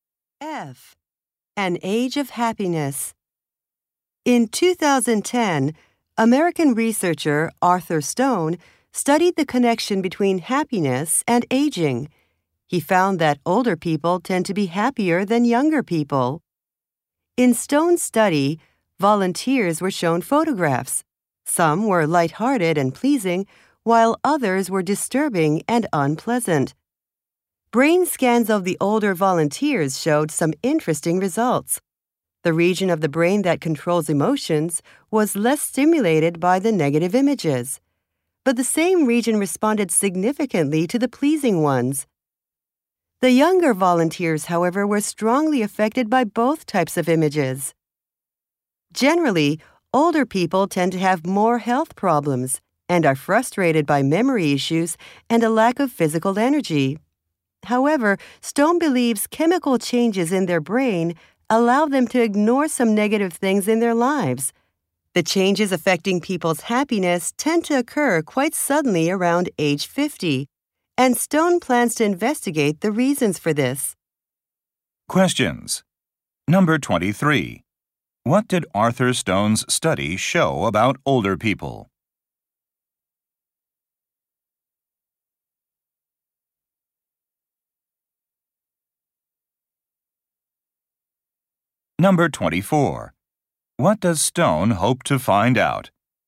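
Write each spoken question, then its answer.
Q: What did Arthur Stone's study show about older people?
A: They react less to negative images, so they tend to be happier.

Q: What does Stone hope to find out?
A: Why changes affecting happiness occur suddenly around age 50.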